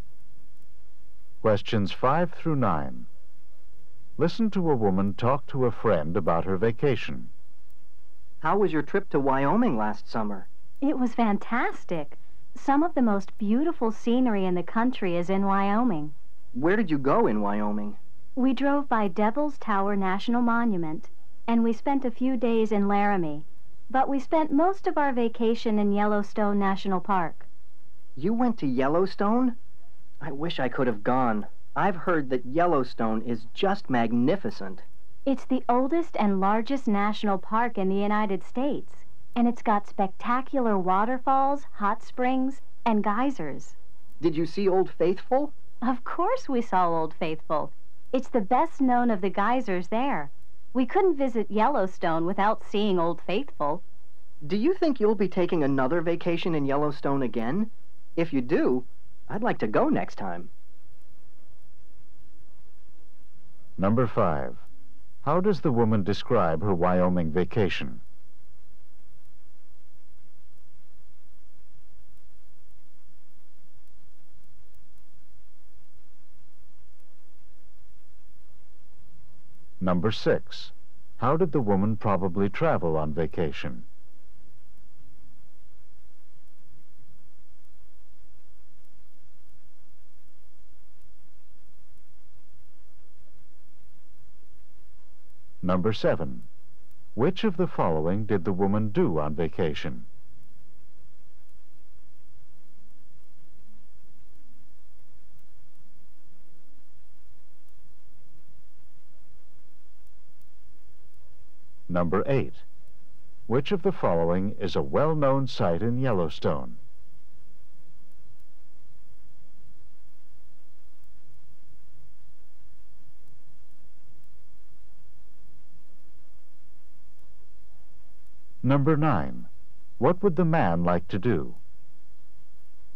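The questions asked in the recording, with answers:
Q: How does the woman describe her Wyoming vacation?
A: Fantastic.

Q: How did the woman probably travel on vacation?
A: By car.

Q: Which of the following is a well-known site in Yellowstone?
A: Old Faithful.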